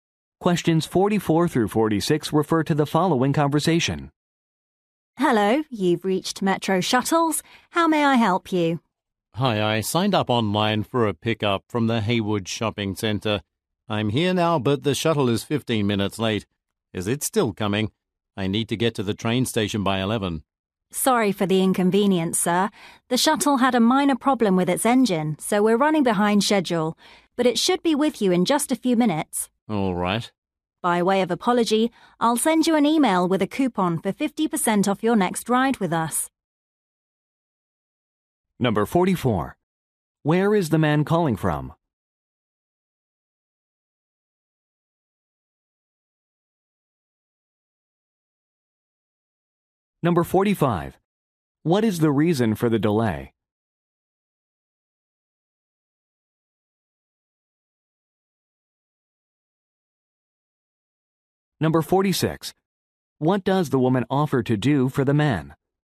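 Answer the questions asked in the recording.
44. A shopping center
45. An engine problem
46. Email him a 50% off coupon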